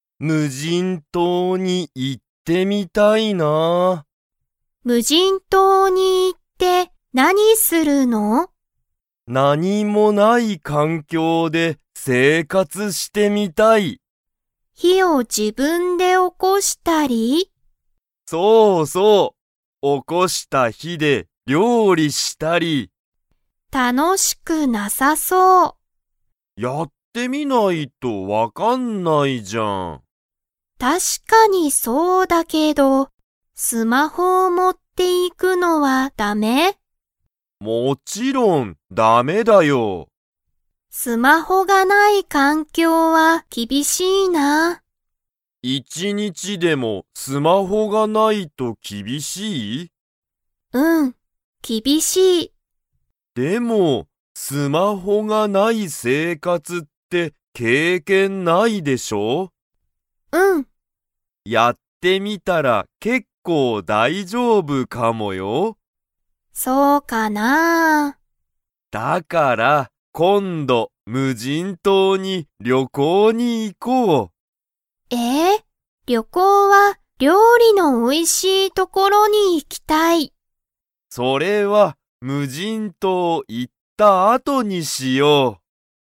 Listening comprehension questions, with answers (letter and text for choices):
Comprehension Quiz (Skip if you don't understand the conversation yet)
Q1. とおるは、無人島(むじんとう)で してみたい。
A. スマホ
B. ゲーム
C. 生活せいかつ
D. 仕事しごと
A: C. 生活せいかつ

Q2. ゆかりは、一いち日にちでもスマホがないと厳きびしいですか?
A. はい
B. いいえ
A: A. はい

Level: Level 3